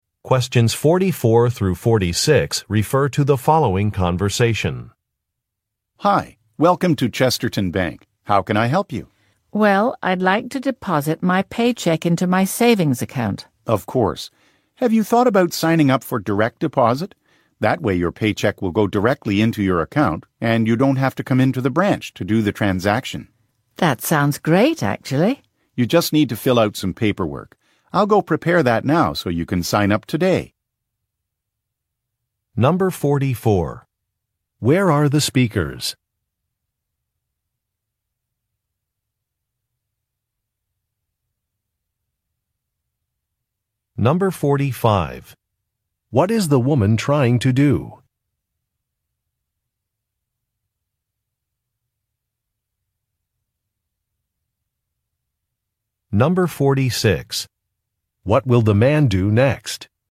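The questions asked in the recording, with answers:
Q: Where are the speakers?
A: At a bank

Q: What is the woman trying to do?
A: Deposit her paycheck into her savings account

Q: What will the man do next?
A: Prepare paperwork for direct deposit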